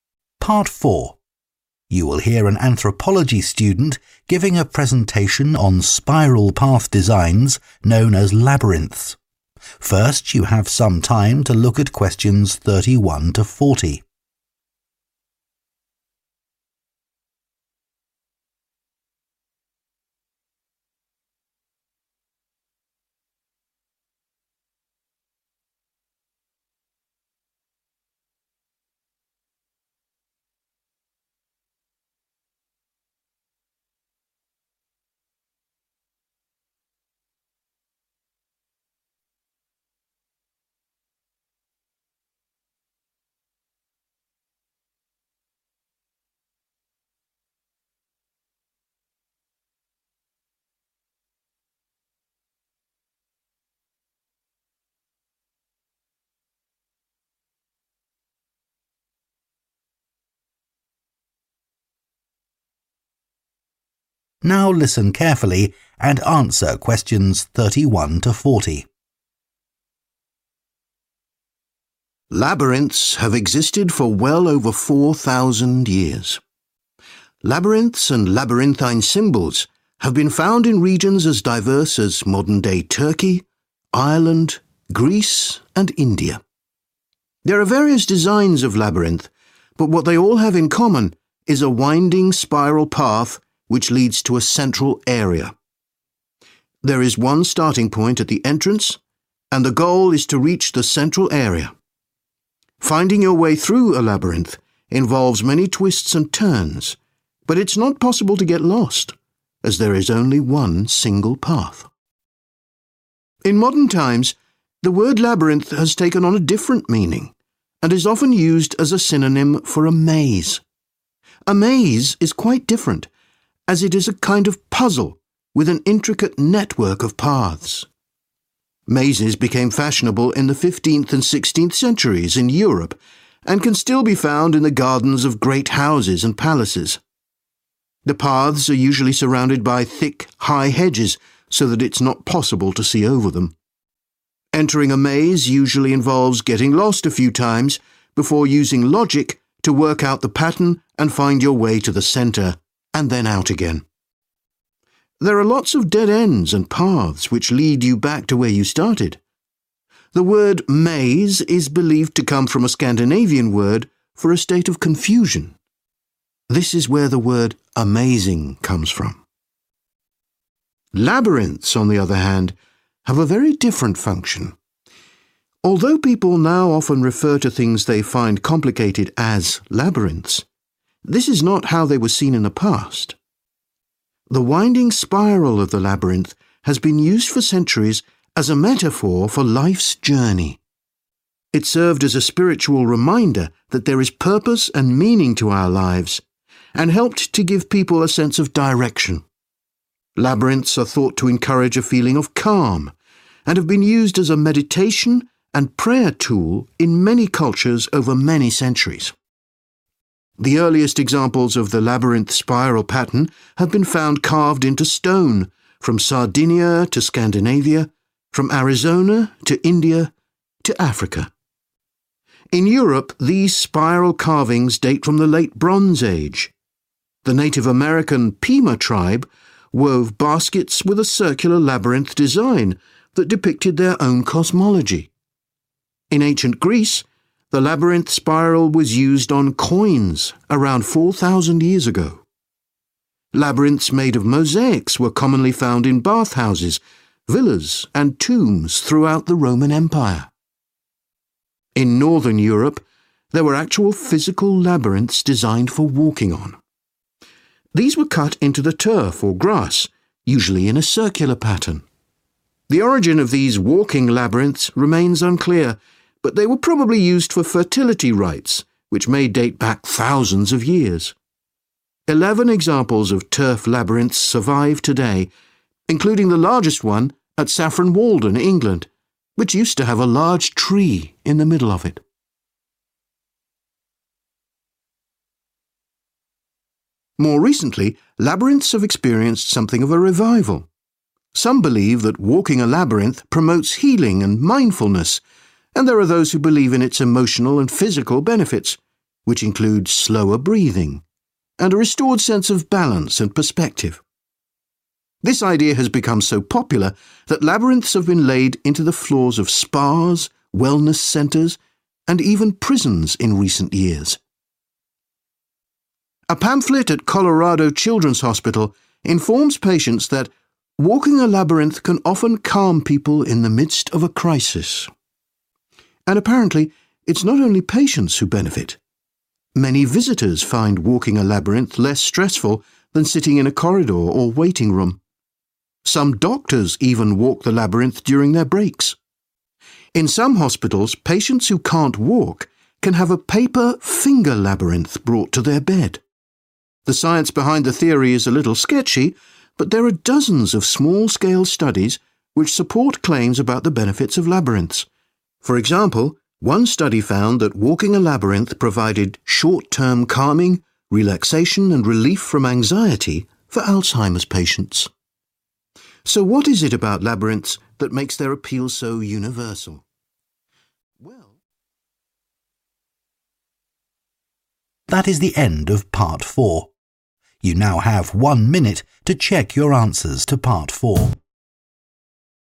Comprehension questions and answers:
Complete the notes below. Write ONE WORD ONLY for each answer.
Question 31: Mazes are a type of 31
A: puzzle

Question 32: 32 is needed to navigate through a maze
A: logic

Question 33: the word 'maze' is derived from a word meaning a feeling of 33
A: confusion

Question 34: they have frequently been used in 34 and prayer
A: meditation

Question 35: Ancient carvings on 35 have been found across many cultures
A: stone

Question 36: Ancient Greeks used the symbol on 36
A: coins

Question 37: The largest surviving example of a turf labyrinth once had a big 37 at its centre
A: tree

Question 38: walking a maze can reduce a person's 38 rate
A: breathing

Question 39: patients who can't walk can use 'finger labyrinths' made from 39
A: paper

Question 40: research has shown that Alzheimer's sufferers experience less 40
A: anxiety